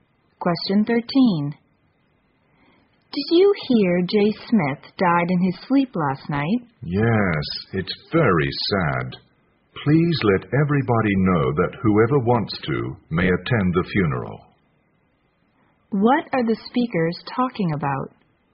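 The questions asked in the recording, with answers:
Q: What are the speakers talking about?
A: Jay Smith's death and funeral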